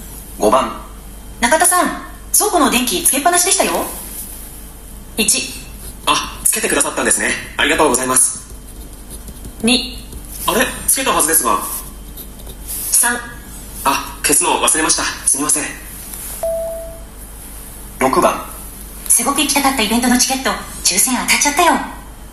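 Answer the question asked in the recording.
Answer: 3: あ、消すのを忘れました、すみません。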